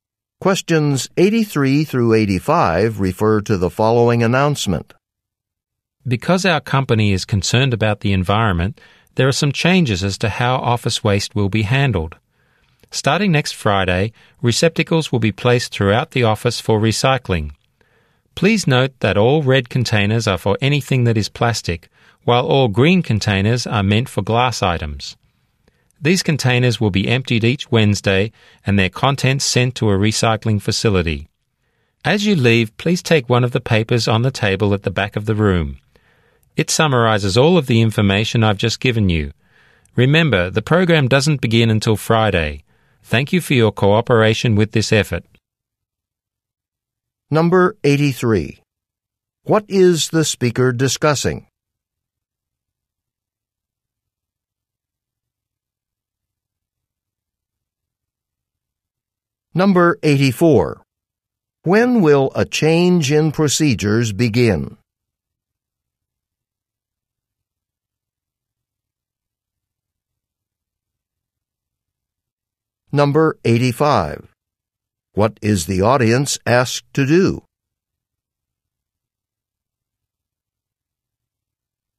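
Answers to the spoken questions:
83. A recycling program
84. Next Friday
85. Take a paper from the table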